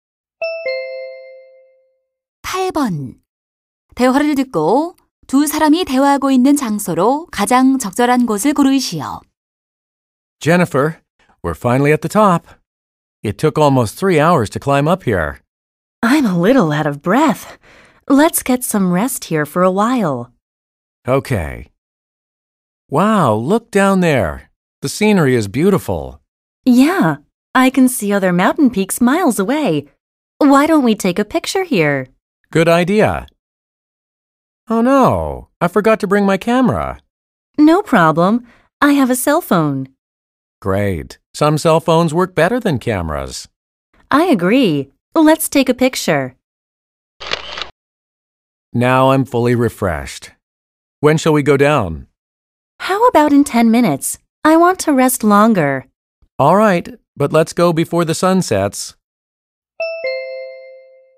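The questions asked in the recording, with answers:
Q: 대화를 듣고 두 사람이 대화하고 있는 장소로 가장 적절한 곳을 고르시오.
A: 산 정상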